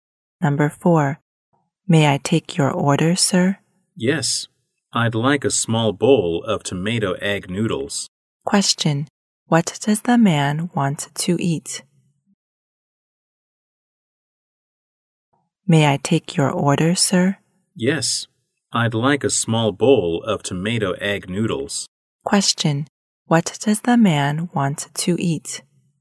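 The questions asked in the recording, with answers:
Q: Question. What does the man want to eat?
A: A small bowl of tomato egg noodles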